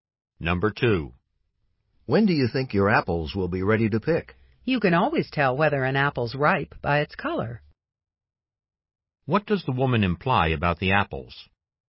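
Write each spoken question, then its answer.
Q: What does the woman imply about the apples?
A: They will be ready when their color shows they are ripe.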